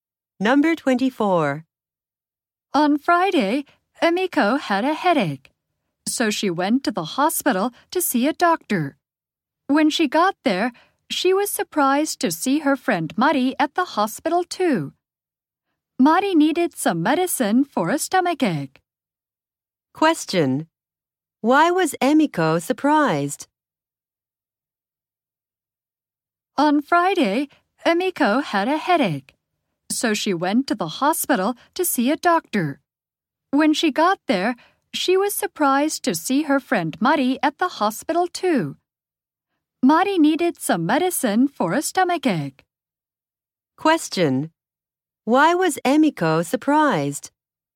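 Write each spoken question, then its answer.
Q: Why was Emiko surprised?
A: She saw her friend Mari at the hospital.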